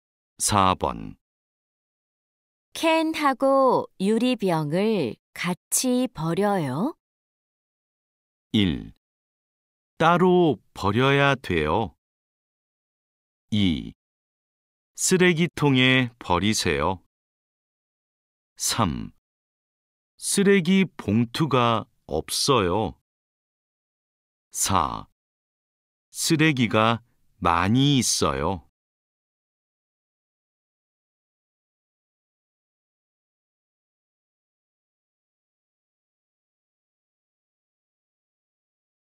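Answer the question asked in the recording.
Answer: 1: 따로 버려야 돼요.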